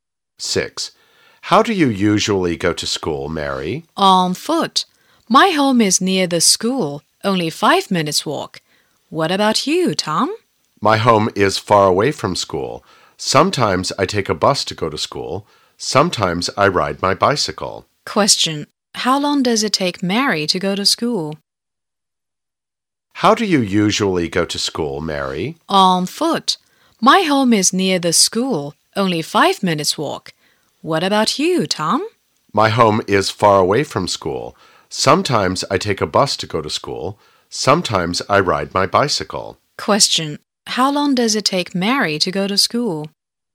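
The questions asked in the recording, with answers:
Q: how long does it take Mary to go to school?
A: 5 minutes on foot.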